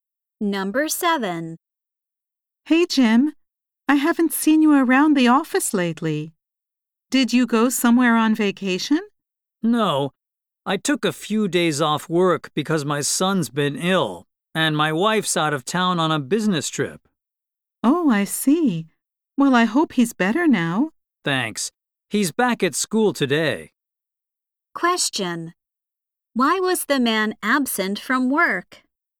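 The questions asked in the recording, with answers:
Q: Why was the man absent from work?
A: He was taking care of his sick son.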